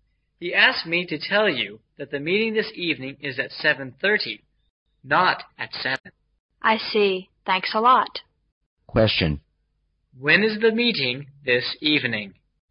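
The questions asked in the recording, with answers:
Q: When is the meeting this evening?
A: At 7:30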